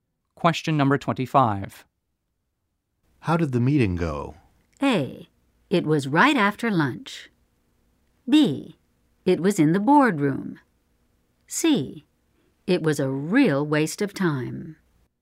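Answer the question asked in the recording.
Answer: C: It was a real waste of time.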